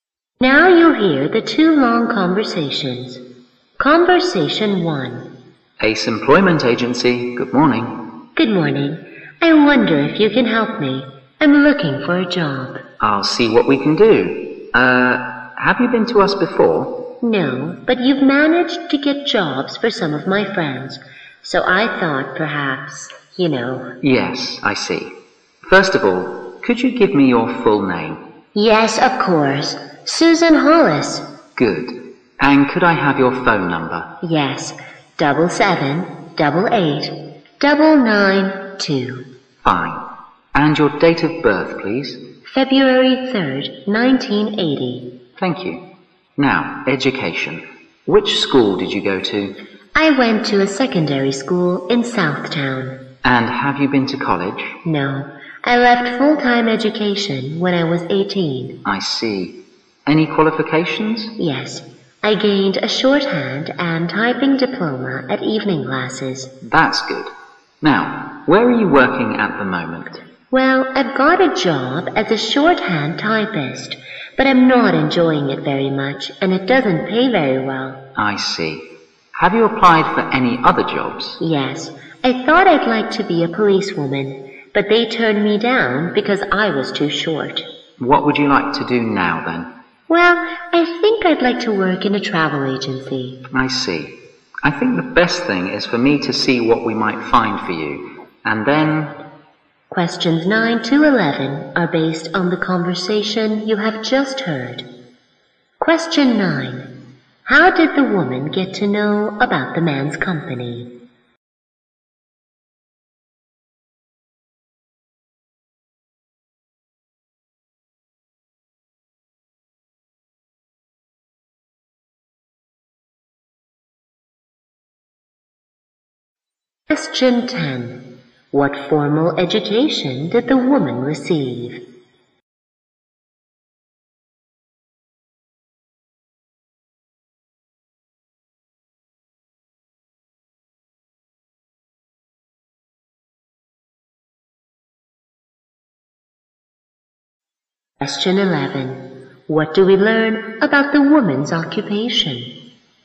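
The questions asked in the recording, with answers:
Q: How did the woman get to know about the man's company?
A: Through her friends, who got jobs through it

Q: What formal education did the woman receive?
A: Secondary school; she left full-time education at 18

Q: What do we learn about the woman's occupation?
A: She is a shorthand typist, unhappy and poorly paid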